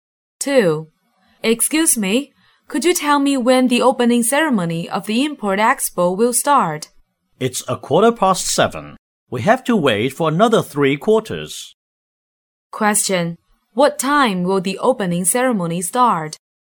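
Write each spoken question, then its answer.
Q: What time will the opening ceremony start?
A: 7:15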